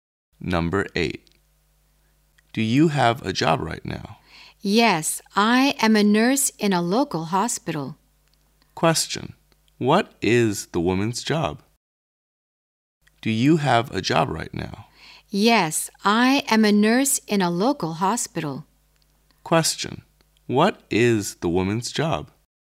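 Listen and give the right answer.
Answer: A nurse in a local hospital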